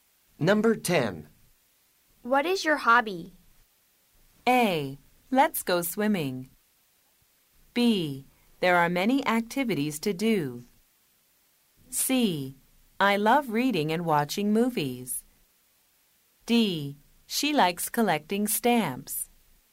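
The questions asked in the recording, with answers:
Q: What is your hobby?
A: C: I love reading and watching movies.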